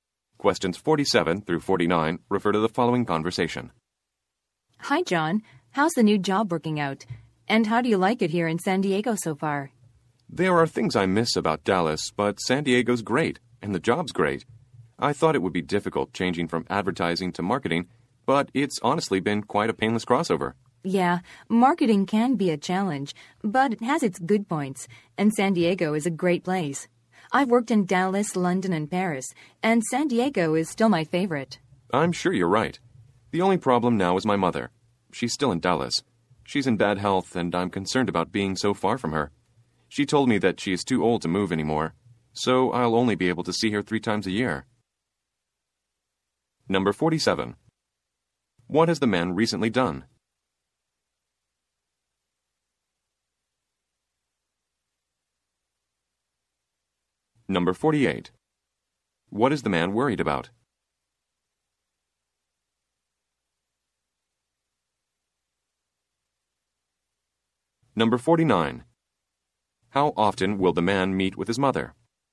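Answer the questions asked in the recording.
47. Moved to San Diego for a new job
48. His mother's health
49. Three times a year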